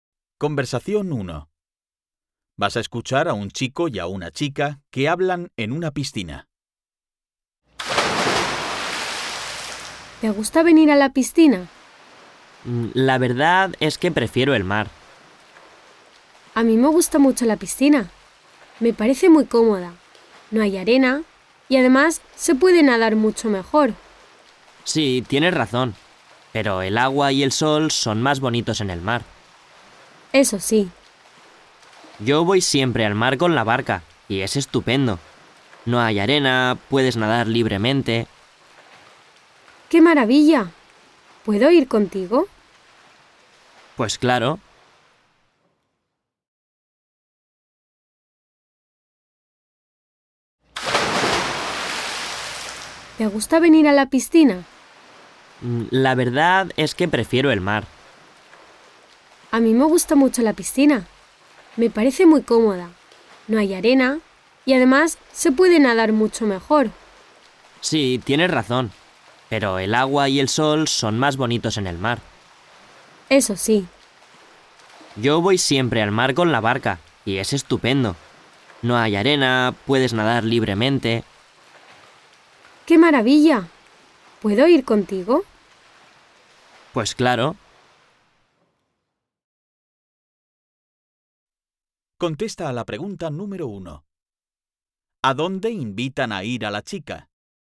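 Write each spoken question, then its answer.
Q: ¿A dónde invitan a ir a la chica?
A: Al mar, en barca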